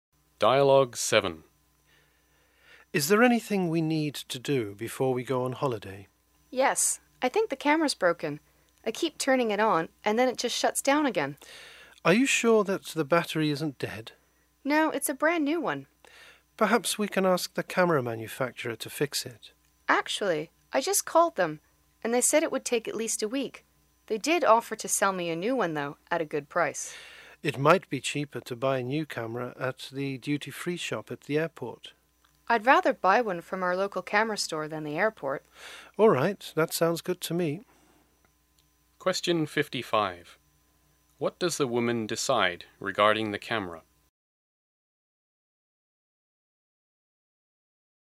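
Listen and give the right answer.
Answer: To buy a new one from their local camera store.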